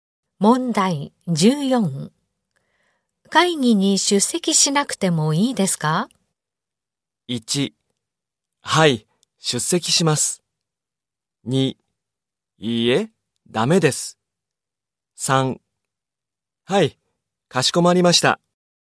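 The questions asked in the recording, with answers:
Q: 会議に出席しなくてもいいですか?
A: 2: いいえ、ダメです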